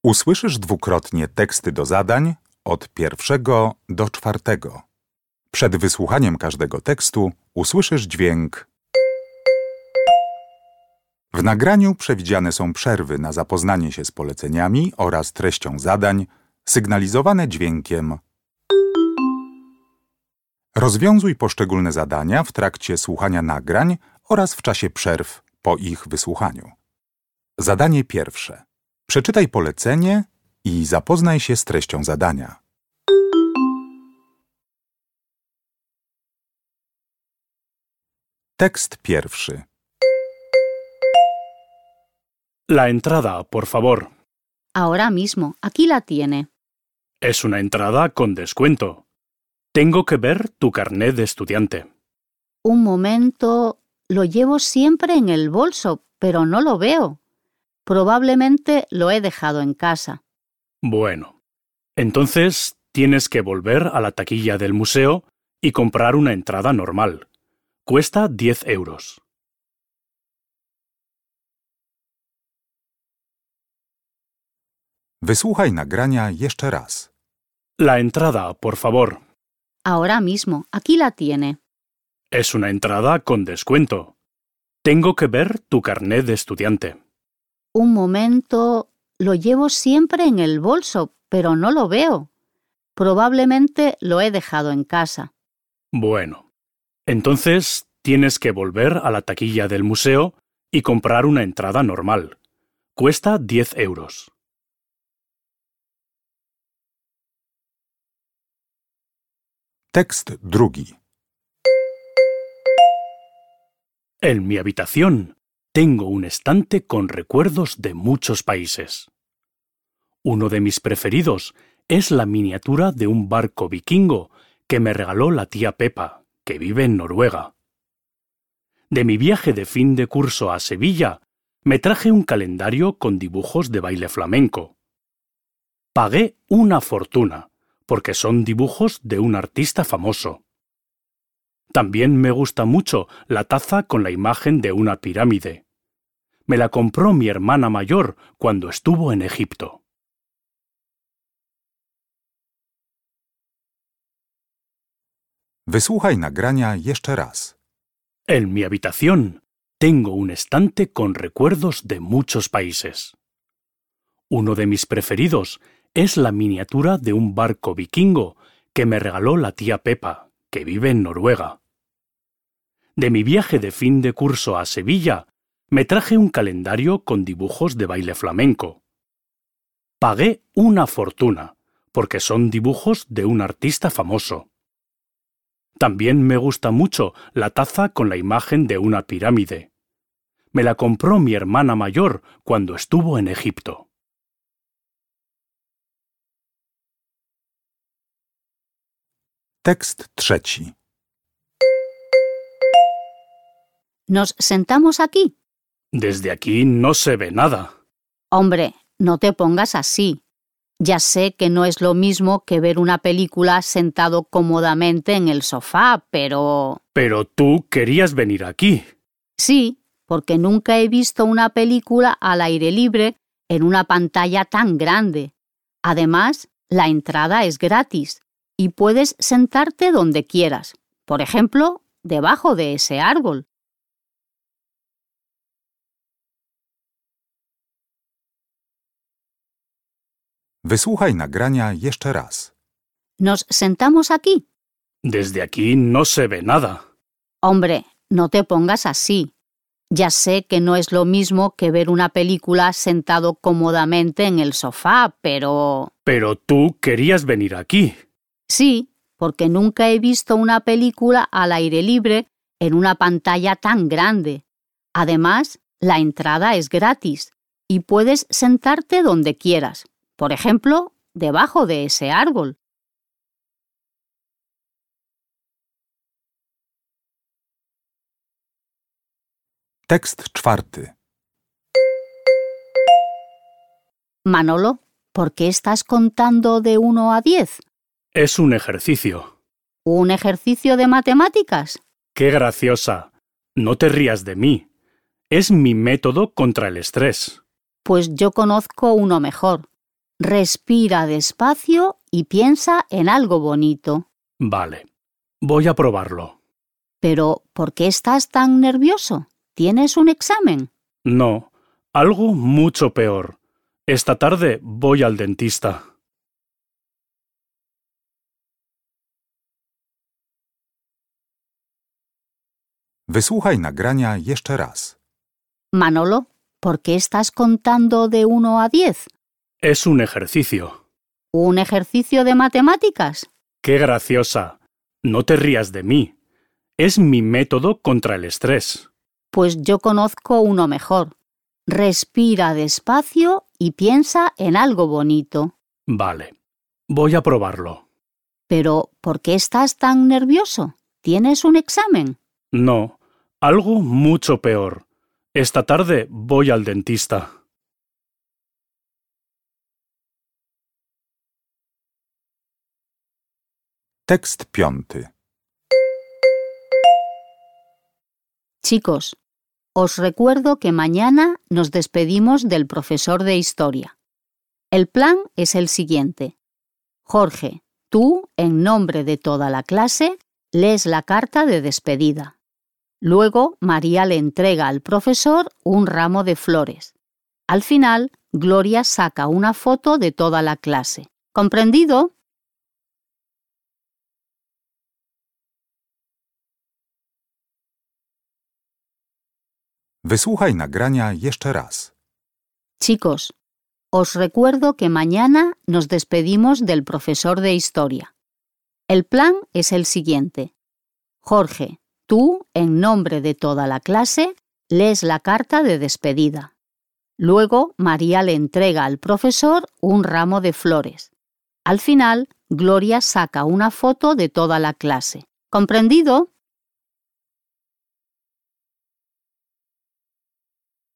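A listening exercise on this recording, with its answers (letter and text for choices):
Uruchamiając odtwarzacz z oryginalnym nagraniem CKE usłyszysz dwukrotnie pięć tekstów. W zadaniach 1.1.–1.5., na podstawie informacji zawartych w nagraniu, z podanych odpowiedzi wybierz właściwą. Zaznacz jedną z liter: A, B albo C.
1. Los chicos hablan de cómo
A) relajarse.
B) entrenar un deporte.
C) estudiar para un test.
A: A) relajarse.

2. La profesora habla a los alumnos para darles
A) las gracias.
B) instrucciones.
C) su opinión sobre algo.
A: B) instrucciones.

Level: ósmoklasisty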